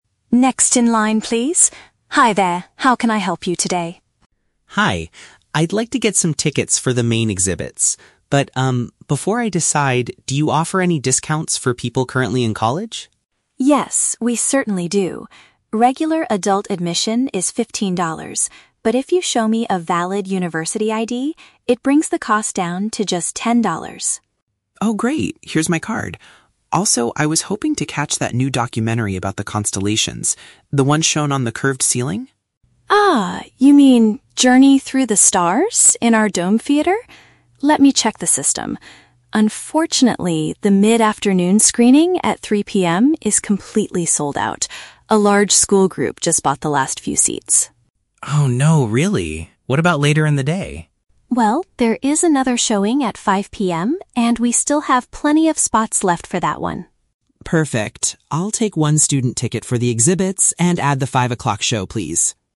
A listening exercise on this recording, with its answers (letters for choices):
Listen to the conversation between a visitor and a ticket agent. Choose the correct answer (A, B, or C) for each question.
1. How can the visitor get a cheaper entrance fee?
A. By purchasing a regular adult ticket for fifteen dollars.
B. By showing proof that he is a university learner.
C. By arriving early for the three o'clock showing.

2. What does the visitor want to see besides the main exhibits?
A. A film projected onto a rounded roof.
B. A live presentation by a famous astronomer.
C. A special guided tour for college students.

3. Why does the visitor have to change his original plan?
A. Because the documentary is only shown to a large school group.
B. Because the five o'clock presentation is much cheaper.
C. Because all the tickets for his preferred time have been purchased.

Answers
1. B
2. A
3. C

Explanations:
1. The agent says the visitor needs to show a "valid university ID" to get the cost down to ten dollars (university ID = proof that he is a university learner). Option (A) is The Trap: Fifteen dollars is the regular price, not the cheaper discounted price. Option (C) is plausible but not mentioned as a way to get a discount.
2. The visitor asks about the documentary shown on the "curved ceiling," which the agent confirms is the "dome theater" (curved ceiling / dome = rounded roof). Option (B) is not mentioned. Option (C) is The Trap: College students are mentioned (for the discount), but the visitor does not ask for a special guided tour.
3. The agent says the 3:00 PM screening is "completely sold out" (all tickets have been purchased). Option (A) is The Trap: The agent mentions that a "large school group just bought the last few seats," but the show is not only for them; it's just that they bought the remaining tickets. Option (B) is not mentioned (the price for the movie isn't discussed).

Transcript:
Ticket Agent: Next in line, please. Hi there, how can I help you today?
Visitor: Hi. I'd like to get some tickets for the main exhibits. But, um, before I decide, do you offer any discounts for people currently in college?
Ticket Agent: Yes, we certainly do. Regular adult admission is fifteen dollars, but if you show me a valid university ID, it brings the cost down to just ten dollars.
Visitor: Oh, great! Here's my card. Also, I was hoping to catch that new documentary about the constellations... the one shown on the curved ceiling?
Ticket Agent: Ah, you mean "Journey Through the Stars" in our dome theater. Let me check the system... Unfortunately, the mid-afternoon screening at 3:00 PM is completely sold out. A large school group just bought the last few seats.
Visitor: Oh no, really? What about later in the day?
Ticket Agent: Well, there is another showing at 5:00 PM, and we still have plenty of spots left for that one.
Visitor: Perfect. I'll take one student ticket for the exhibits and add the five o'clock show, please.